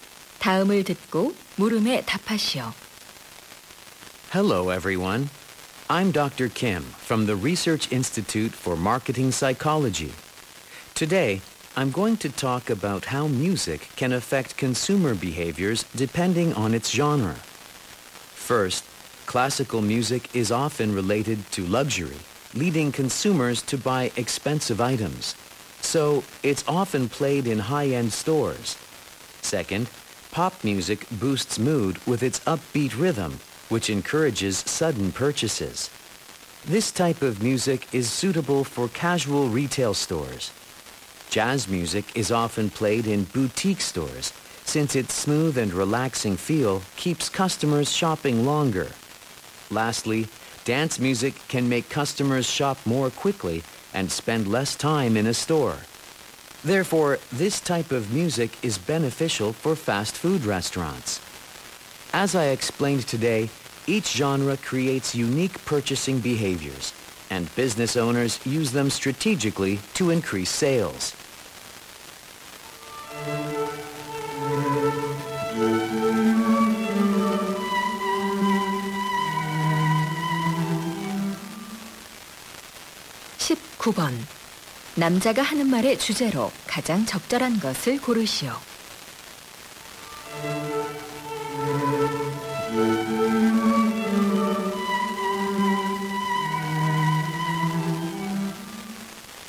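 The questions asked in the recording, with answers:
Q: 남자가 하는 말의 주제로 가장 적절한 것을 고르시오.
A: 음악 장르에 따라 소비자 행동에 미치는 영향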